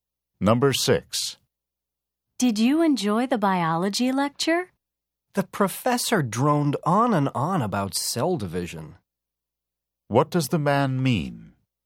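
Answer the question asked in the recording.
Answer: The lecture was boring.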